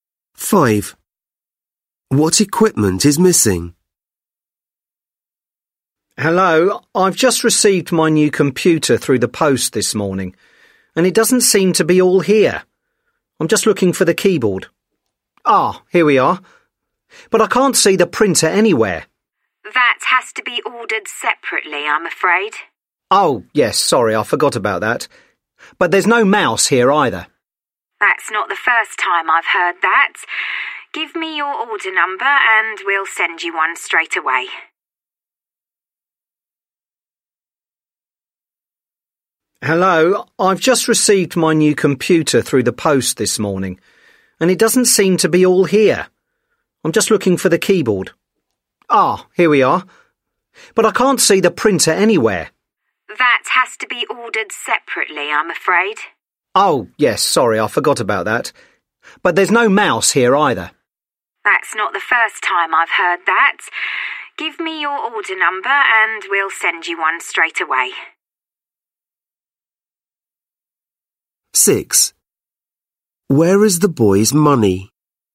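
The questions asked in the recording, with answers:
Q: What equipment is missing?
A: The mouse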